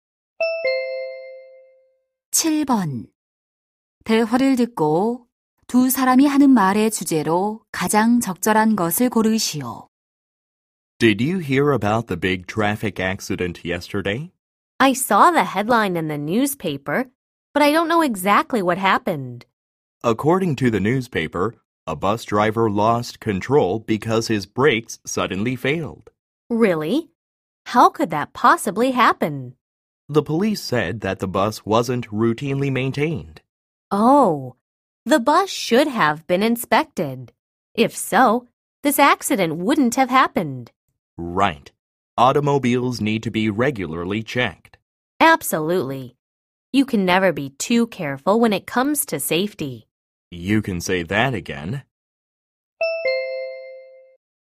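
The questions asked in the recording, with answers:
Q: 대화를 듣고 두 사람이 하는 말의 주제로 가장 적절한 것을 고르시오.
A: 자동차 정기 점검의 필요성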